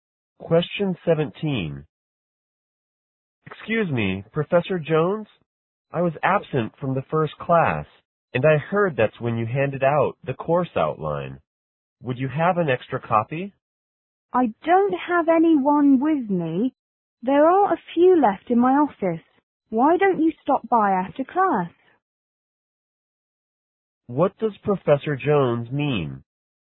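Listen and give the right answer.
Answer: The student can get a copy of the outline from his office after class.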